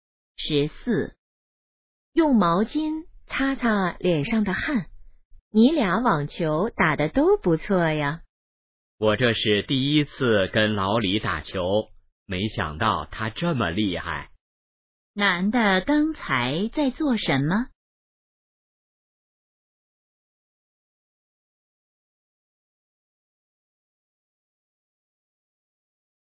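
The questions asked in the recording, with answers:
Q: 男的刚才在做什么?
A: 打网球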